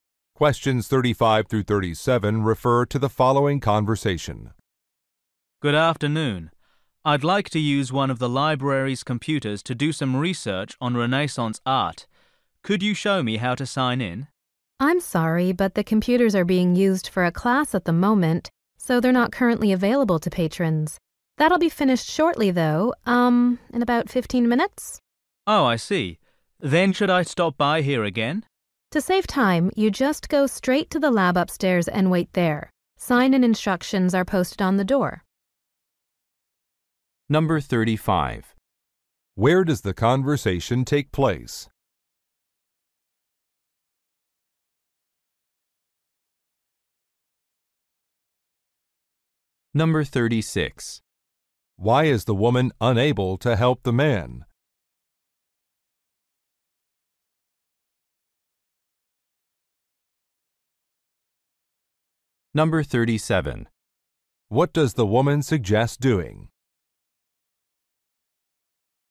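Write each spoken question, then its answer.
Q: Where does the conversation take place?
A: At a library

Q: Why is the woman unable to help the man?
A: A class is using the computers

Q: What does the woman suggest doing?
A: Going straight to the lab upstairs and waiting there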